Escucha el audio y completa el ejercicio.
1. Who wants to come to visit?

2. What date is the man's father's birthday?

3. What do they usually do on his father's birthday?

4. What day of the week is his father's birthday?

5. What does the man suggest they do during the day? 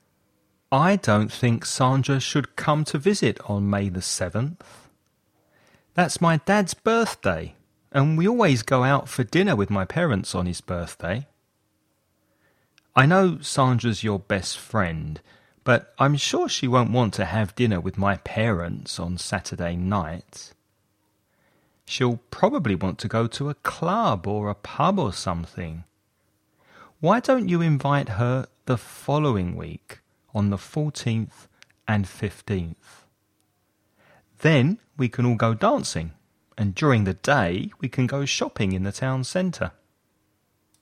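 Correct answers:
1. Sandra
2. May the 7th
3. Go out for dinner with his parents
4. Saturday
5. Go shopping in the town centre

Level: nivel básico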